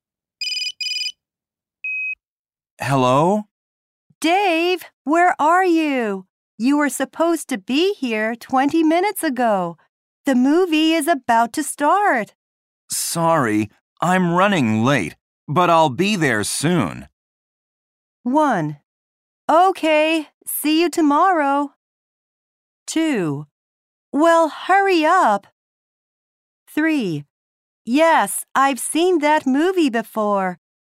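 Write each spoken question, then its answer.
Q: Sorry, I'm running late, but I'll be there soon.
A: 2: Well, hurry up.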